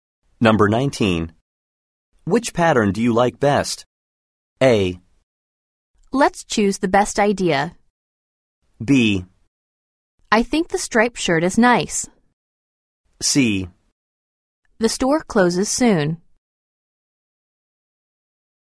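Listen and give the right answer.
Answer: B: I think the striped shirt is nice.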